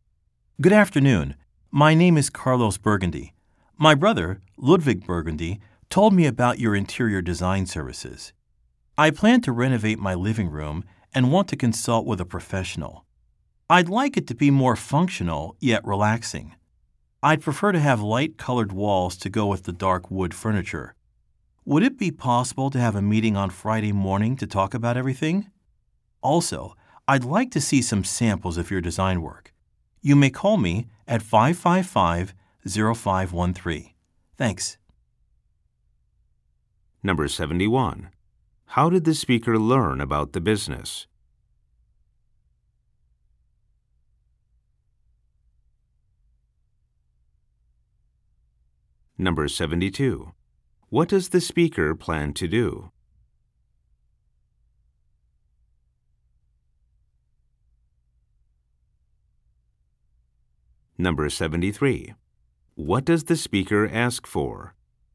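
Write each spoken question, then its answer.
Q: How did the speaker learn about the business?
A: From his brother, Ludwig Burgundy

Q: What does the speaker plan to do?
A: Renovate his living room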